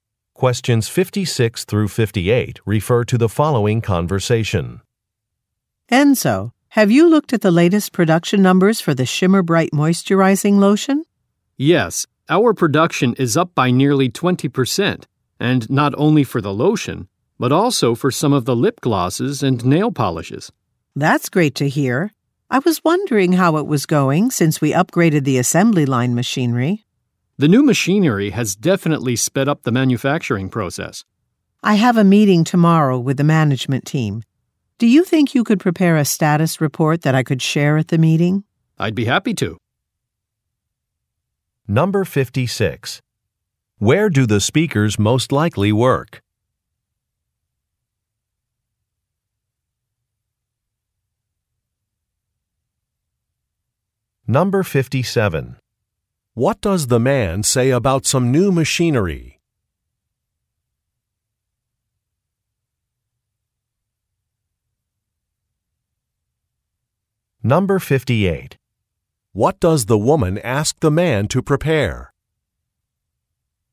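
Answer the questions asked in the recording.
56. At a cosmetics manufacturer
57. It has sped up the manufacturing process
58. A status report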